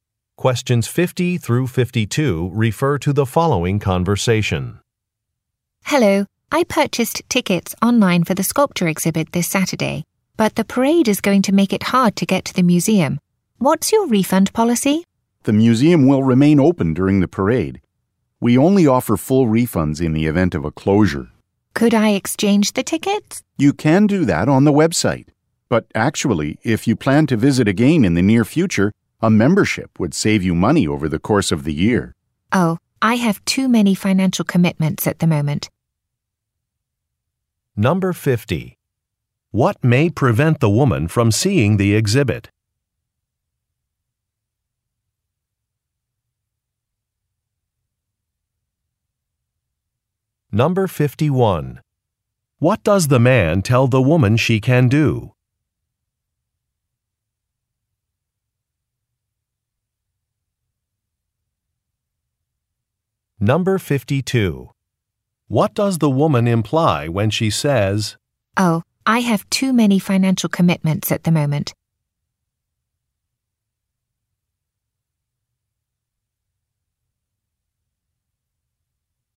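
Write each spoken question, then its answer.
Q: What may prevent the woman from seeing the exhibit?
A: A parade

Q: What does the man tell the woman she can do?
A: Exchange her tickets on the website

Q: What does the woman imply when she says,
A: She does not want to buy a membership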